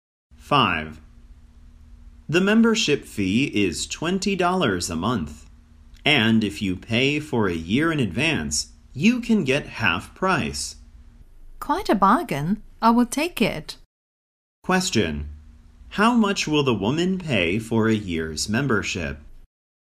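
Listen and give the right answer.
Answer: $120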